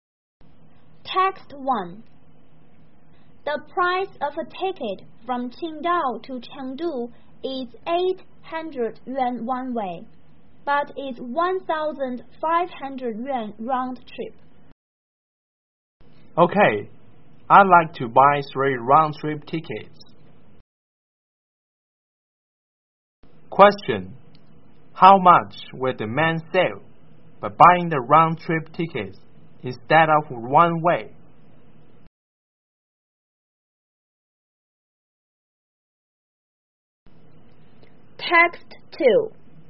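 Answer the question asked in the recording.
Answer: 300 yuan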